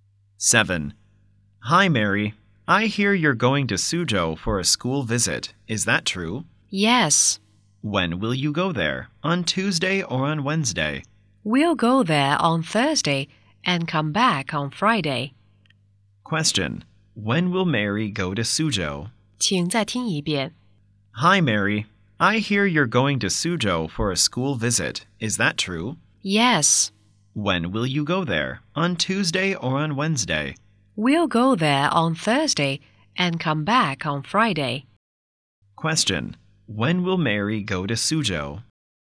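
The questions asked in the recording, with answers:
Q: When will Mary go to Suzhou?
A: On Thursday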